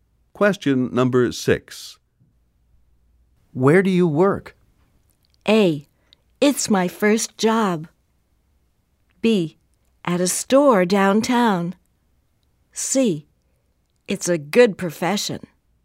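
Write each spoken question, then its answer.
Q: Where do you work?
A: B: At a store downtown.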